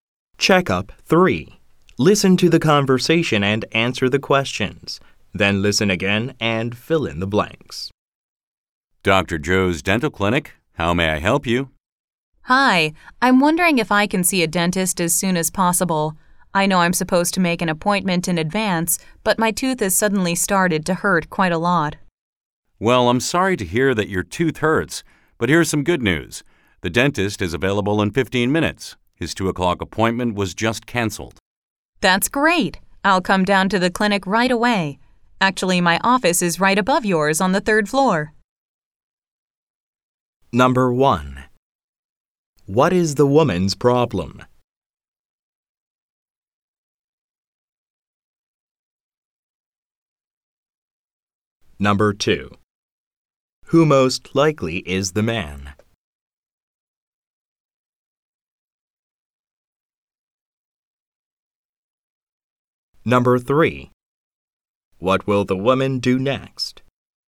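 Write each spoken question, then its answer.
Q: What is the woman's problem?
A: Her tooth suddenly started to hurt a lot.

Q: Who most likely is the man?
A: A receptionist at a dental clinic.

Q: What will the woman do next?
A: Go to the clinic right away.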